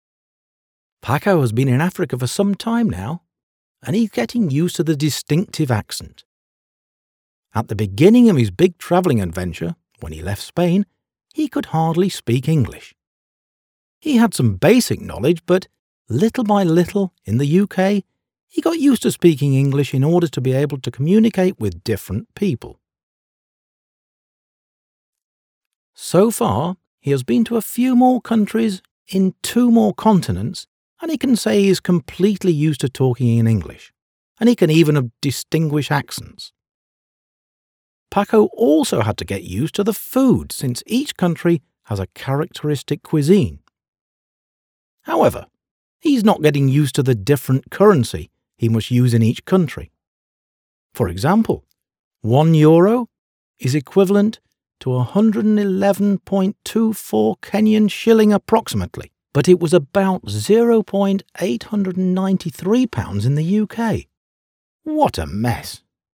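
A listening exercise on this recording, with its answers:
Read the text again and decide if the following statements are true or false:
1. Paco uses English habitually.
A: Verdadero

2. Although he can speak English very well, he can't distinguish the accents.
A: Falso

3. He finds currency conversion quite easy.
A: Falso

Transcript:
Paco has been in Africa for some time now and he is getting used to the distinctive accent. At the beginning of his big travelling adventure, when he left Spain, he could hardly speak English. He had some basic knowledge but, little by little, in the UK, he got used to speaking English in order to be able to communicate with different people. So far he has been to a few more countries in two more continents and he can say he is completely used to talking in English, and he can even distinguish accents! Paco also had to get used to the food since each country has a characteristic cuisine. 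However, he is not getting used to the different currency he must use in each country. For example, one Euro is equivalent to 111.24 Kenyan Shilling approximately, but it was about 0'893 pounds in the UK. What a mess!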